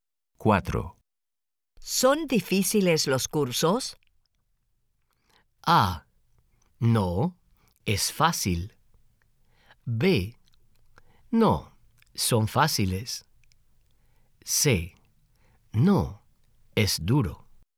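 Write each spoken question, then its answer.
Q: ¿Son difíciles los cursos?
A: B: No, son fáciles.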